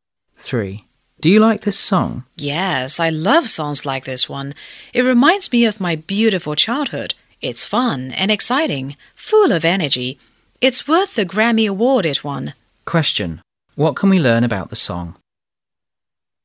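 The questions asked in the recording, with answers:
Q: Question. What can we learn about the song?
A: It won a Grammy Award and is full of energy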